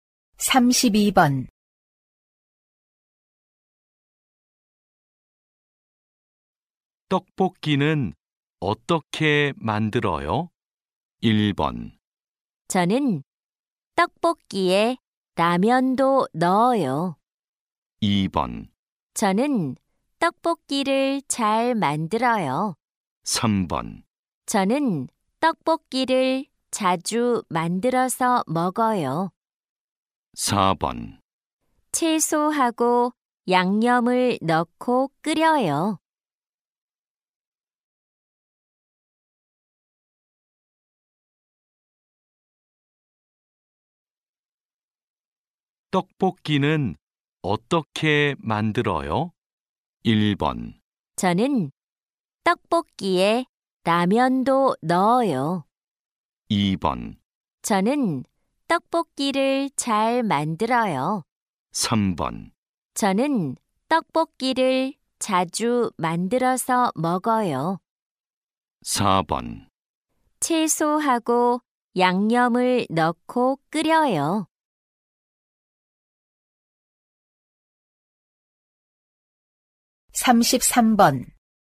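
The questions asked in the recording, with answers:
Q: 떡볶이는 어떻게 만들어요?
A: 4: 채소하고 양념을 넣고 끓여요.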